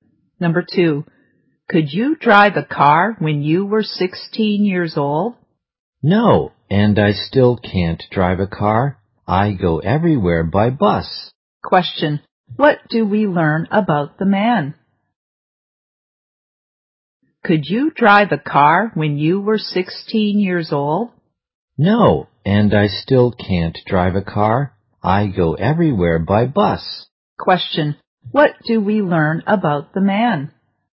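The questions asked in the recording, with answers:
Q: what do we learn about the man?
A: He can't drive a car and goes everywhere by bus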